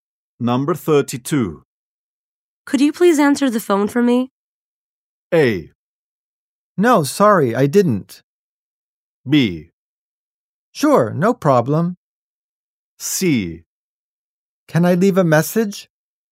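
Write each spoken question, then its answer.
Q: Could you please answer the phone for me?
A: B: Sure, no problem.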